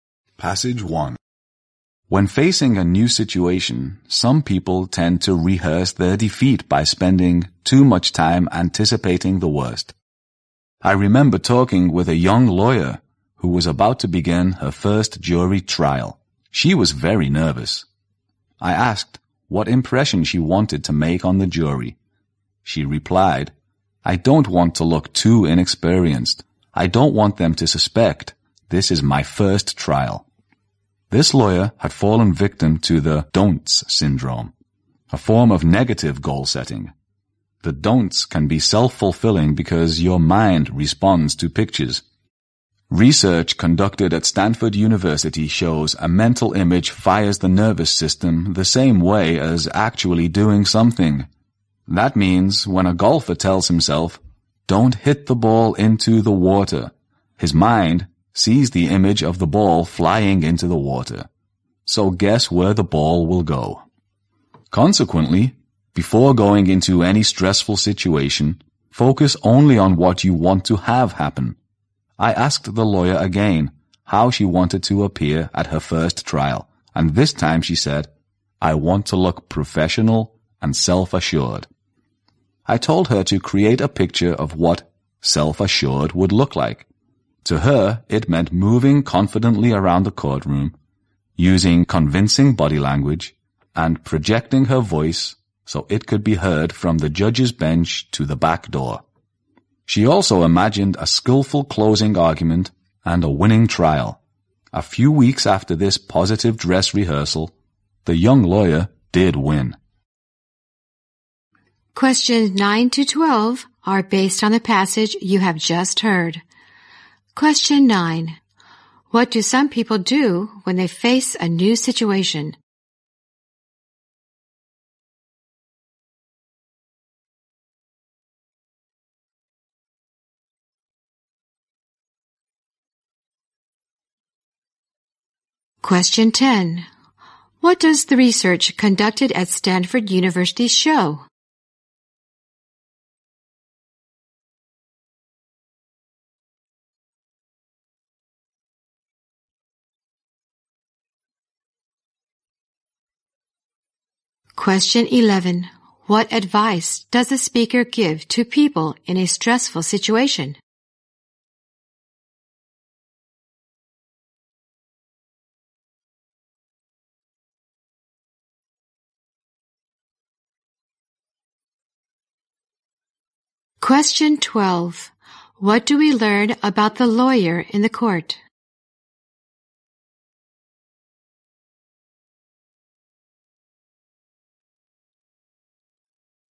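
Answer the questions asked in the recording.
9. They spend too much time anticipating the worst
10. A mental image fires the nervous system the same way as actually doing something
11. Focus only on what you want to have happen
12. She won her first trial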